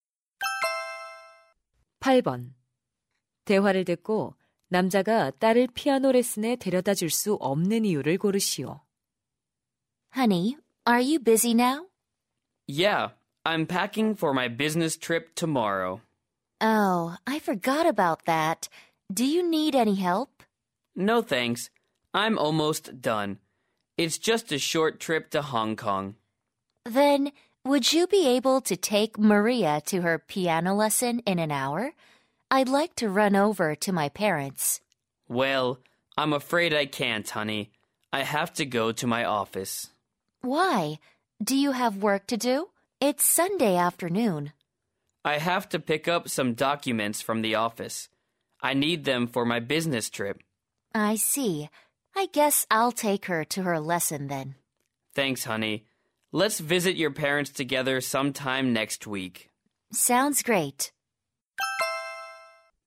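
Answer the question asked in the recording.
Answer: 출장에 필요한 서류를 가지러 사무실에 가야 해서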